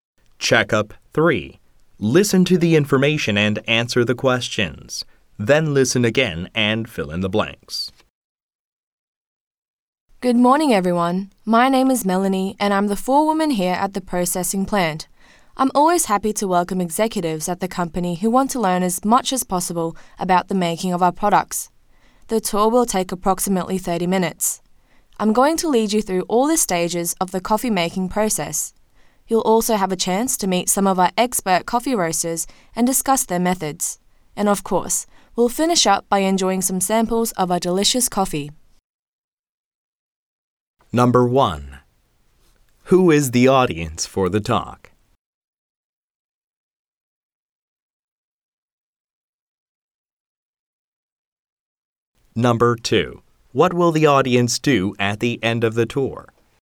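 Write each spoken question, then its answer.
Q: Who is the audience for the talk?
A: Company executives

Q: What will the audience do at the end of the tour?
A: Enjoy some samples of the coffee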